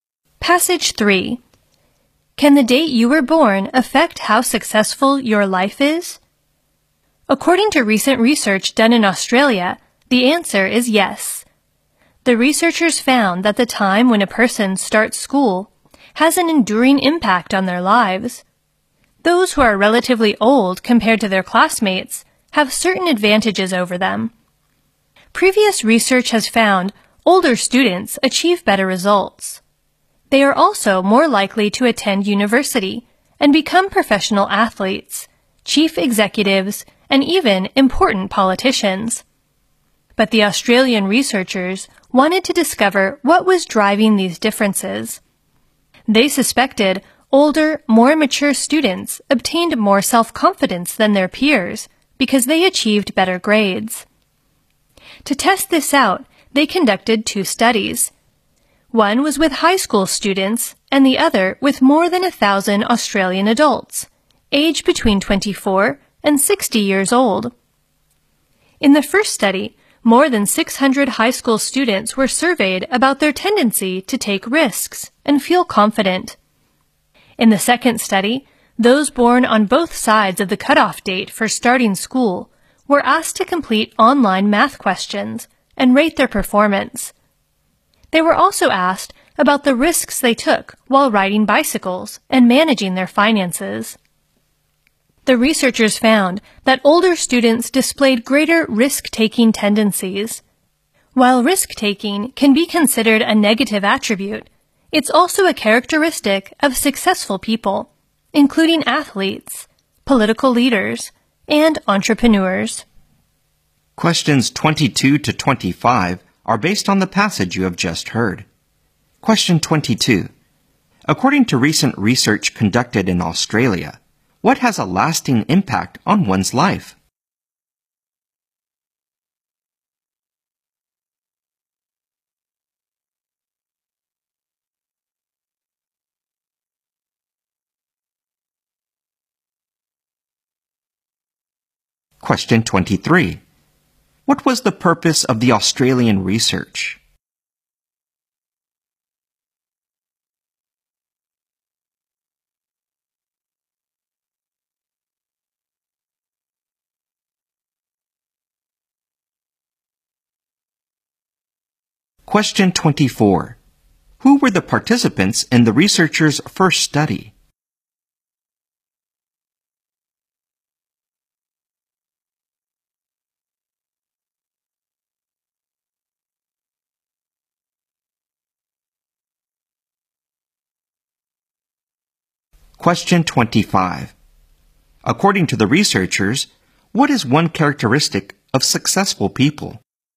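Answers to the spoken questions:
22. The time when a person starts school
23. To discover what was driving these differences
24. More than 600 high school students
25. Risk-taking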